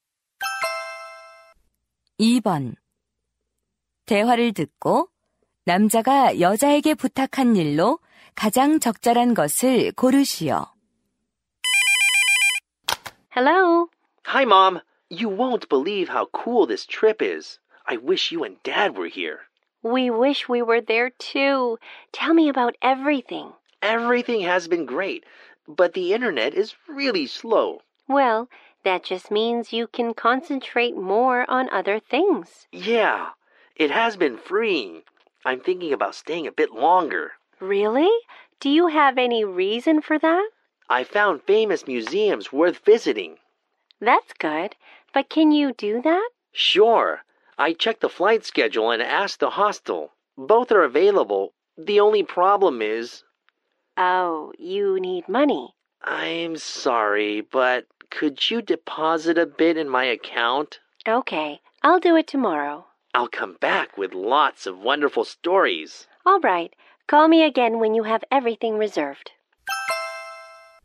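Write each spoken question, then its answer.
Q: 대화를 듣고 남자가 여자에게 부탁한 일로 가장 적절한 것을 고르시오.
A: 계좌에 돈 입금하기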